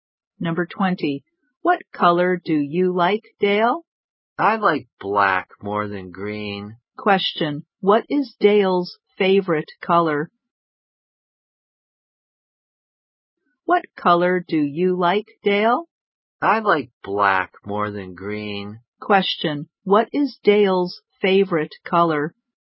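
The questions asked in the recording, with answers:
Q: What is Dale's favorite color?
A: Black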